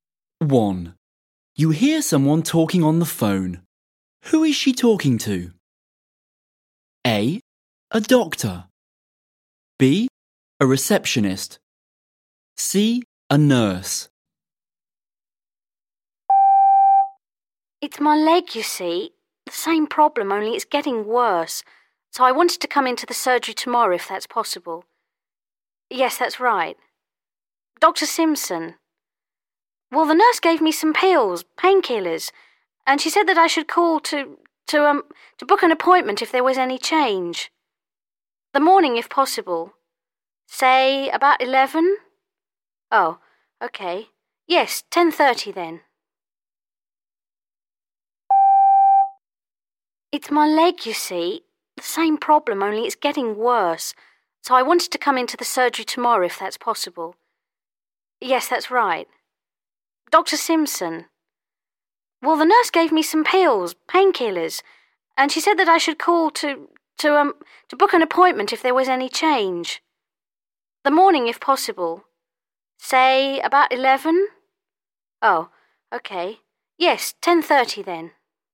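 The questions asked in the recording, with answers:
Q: Who is she talking to?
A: B: A receptionist.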